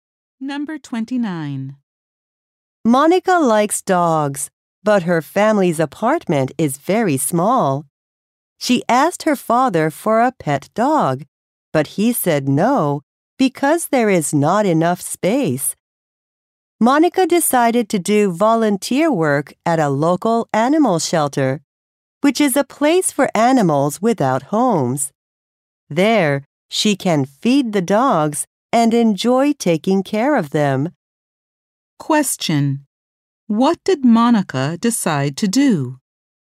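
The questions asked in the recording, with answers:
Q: Question. What did Monica decide to do?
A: Volunteer at an animal shelter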